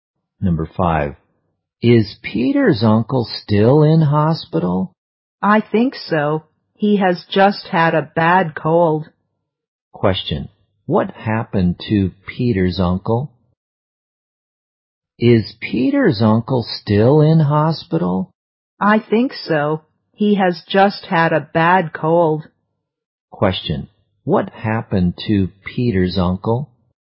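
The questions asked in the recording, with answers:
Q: What happened to Peter's uncle?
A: He had a bad cold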